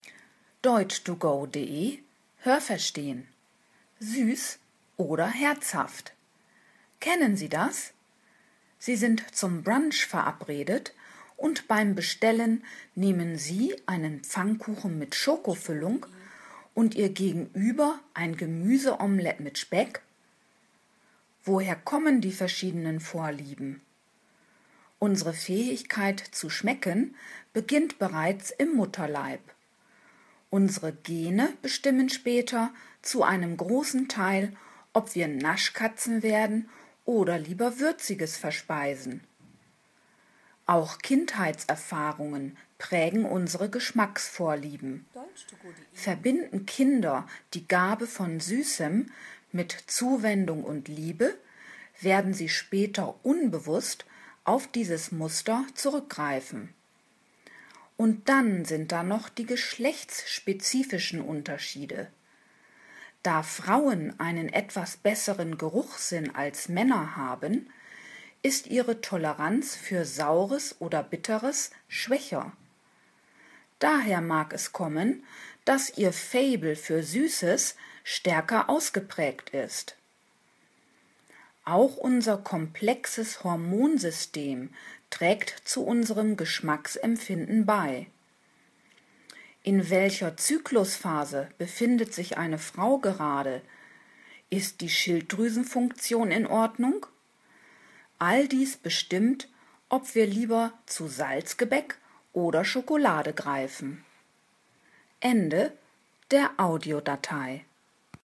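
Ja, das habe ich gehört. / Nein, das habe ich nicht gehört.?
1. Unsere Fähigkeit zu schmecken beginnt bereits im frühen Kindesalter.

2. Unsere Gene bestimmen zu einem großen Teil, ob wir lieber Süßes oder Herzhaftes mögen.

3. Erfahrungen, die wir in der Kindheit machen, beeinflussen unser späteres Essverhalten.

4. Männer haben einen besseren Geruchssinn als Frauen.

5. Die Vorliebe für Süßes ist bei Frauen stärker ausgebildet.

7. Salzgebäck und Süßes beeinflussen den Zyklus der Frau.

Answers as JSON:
{"1": "Nein, das habe ich nicht gehört.", "2": "Ja, das habe ich gehört.", "3": "Ja, das habe ich gehört.", "4": "Nein, das habe ich nicht gehört.", "5": "Ja, das habe ich gehört.", "7": "Nein, das habe ich nicht gehört."}

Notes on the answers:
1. Sie beginnt schon im Mutterleib, also vor der Geburt.
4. Es ist genau umgekehrt: Frauen haben einen besseren Geruchssinn als Männer.

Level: C1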